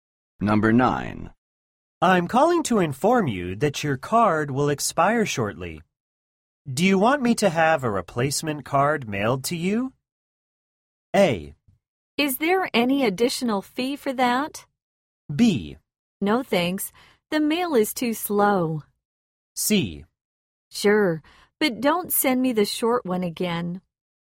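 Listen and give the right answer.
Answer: A: Is there any additional fee for that?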